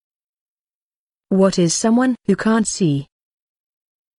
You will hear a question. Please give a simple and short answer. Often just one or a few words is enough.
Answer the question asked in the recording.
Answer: Blind